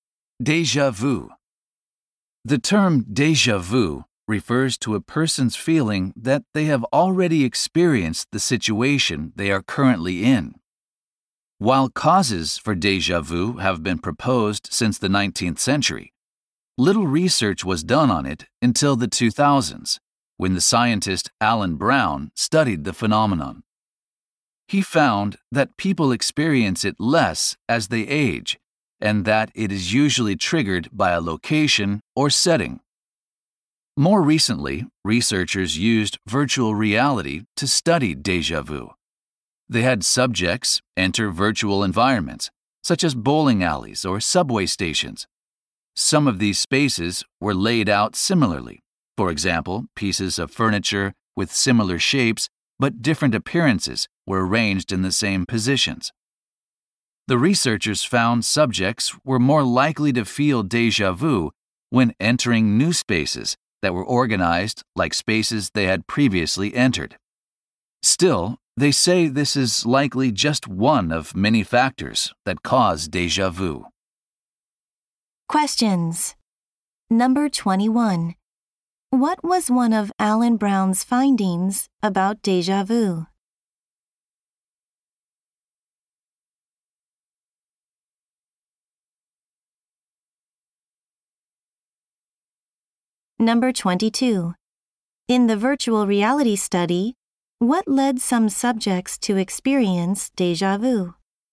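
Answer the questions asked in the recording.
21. People experience it less as they age.
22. Entering new spaces organized like spaces they had previously entered.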